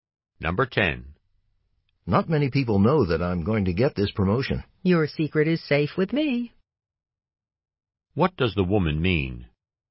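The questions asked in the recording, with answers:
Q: What does the woman mean?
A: She won't tell anyone about the promotion.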